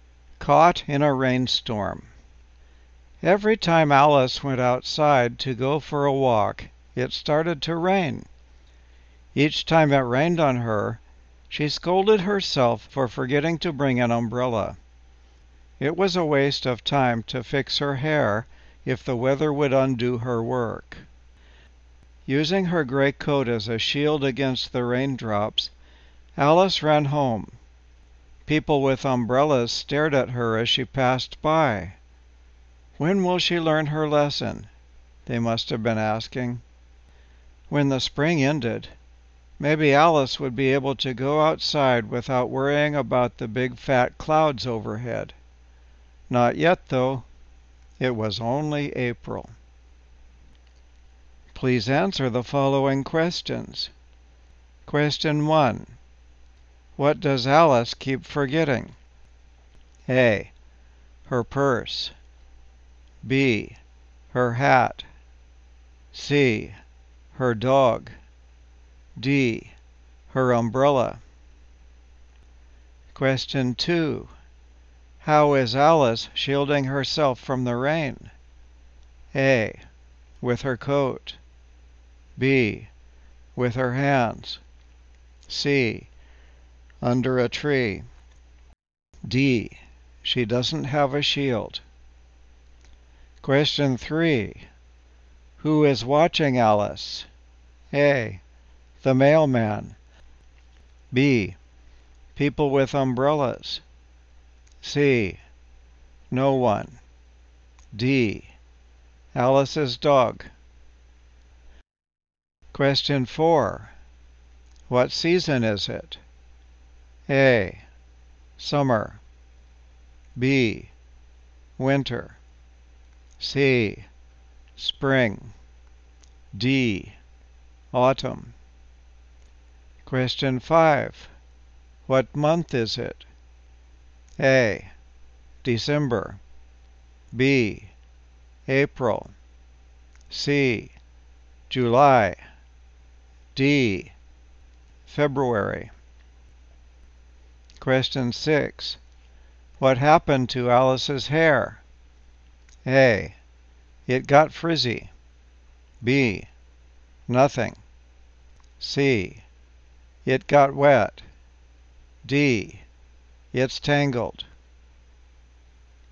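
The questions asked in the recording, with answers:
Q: What does Alice keep forgetting?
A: D: Her umbrella.

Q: How is Alice shielding herself from the rain?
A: A: With her coat.

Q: Who is watching Alice?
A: B: People with umbrellas.

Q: What season is it?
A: C: Spring.

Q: What month is it?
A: B: April.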